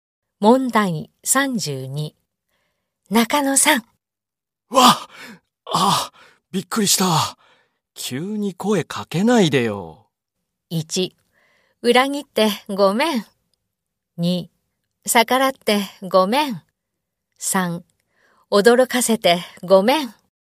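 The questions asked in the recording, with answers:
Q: 中野さん。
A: 3: 驚かせてごめん。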